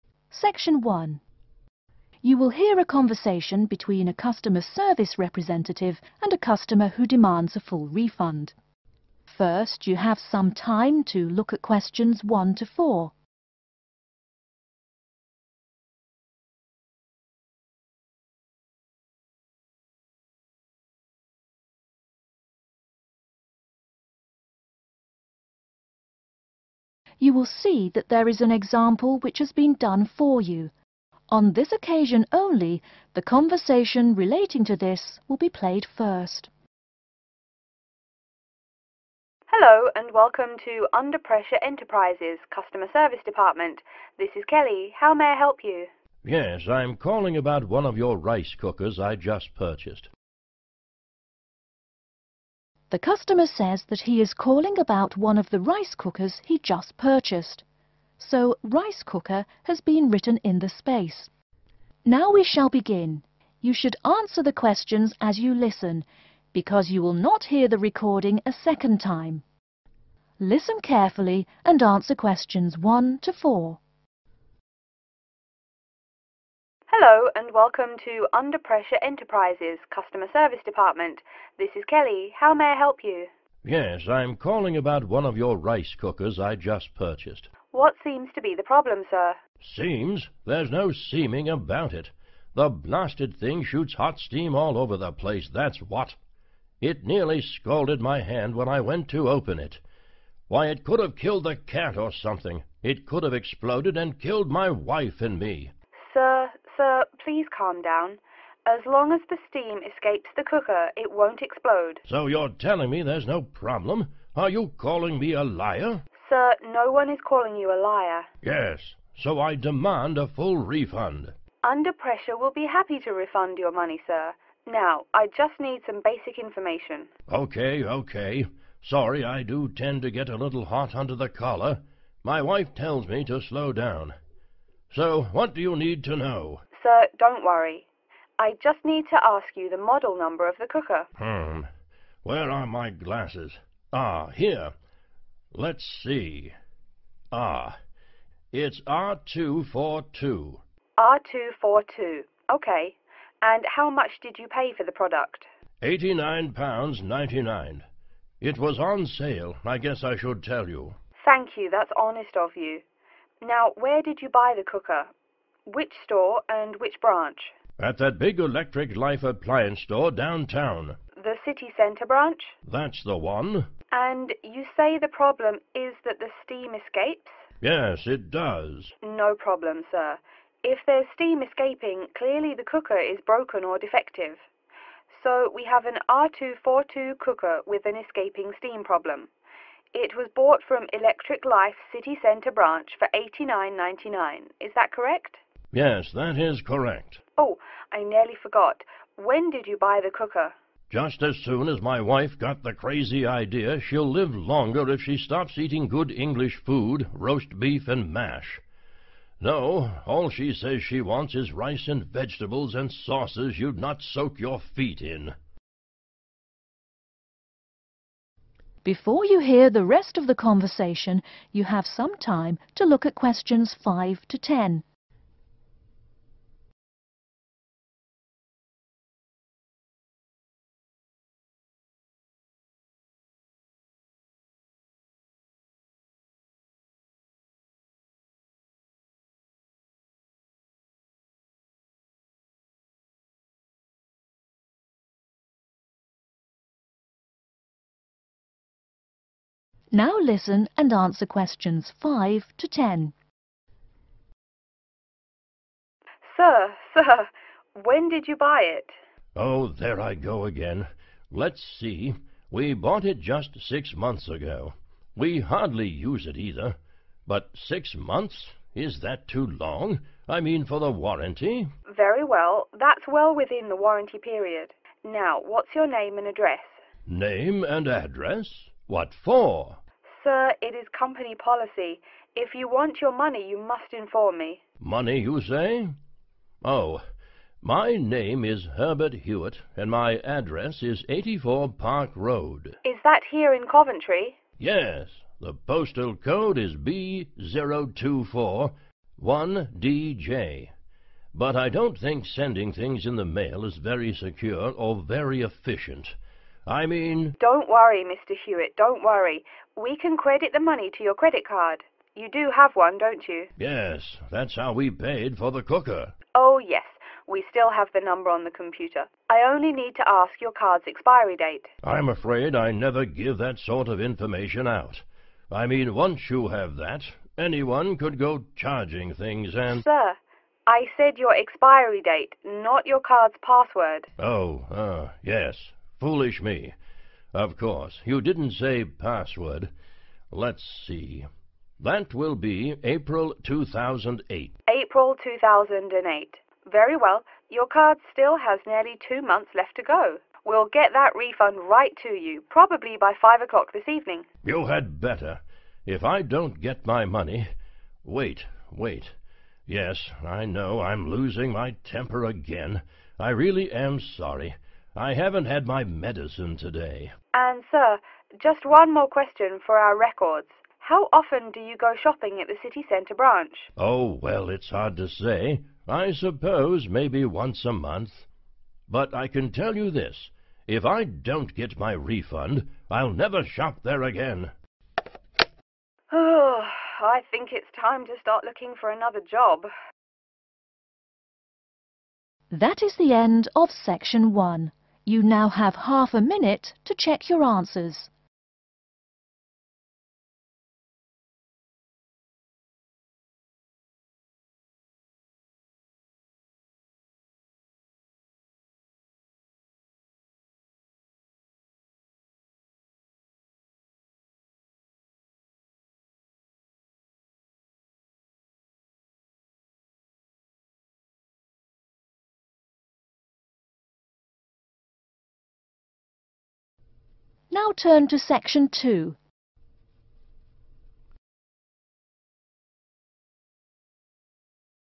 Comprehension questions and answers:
Complete the form below. Write NO MORE THAN TWO WORDS AND/OR A NUMBER for each answer.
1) Model Number: 1...............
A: R242

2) Price of the Product: £ 2...............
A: 89.99

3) Name of the Branch: 3...............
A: City Centre

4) Problem: 4...............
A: steam escaping/ escaping steam

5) Address: 5...............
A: 84 Park Road

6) Postcode: 6...............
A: B0241DJ

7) Method of payment: 7...............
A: credit card

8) Card's Expiry Date: 8...............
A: April 2008

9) Method of Compensation: 9...............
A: refund

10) Shopping Frequency: 10...............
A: once a month